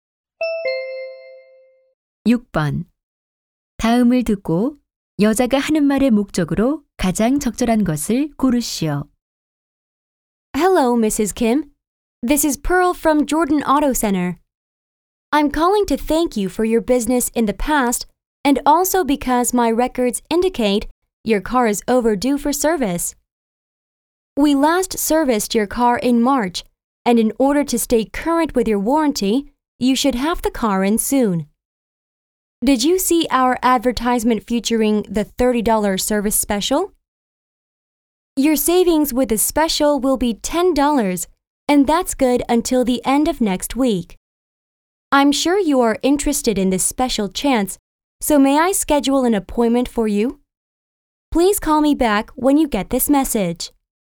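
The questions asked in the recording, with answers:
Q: 다음을 듣고 여자가 하는 말의 목적으로 가장 적절한 것을 고르시오.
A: 차량 정비 예약을 권유하려고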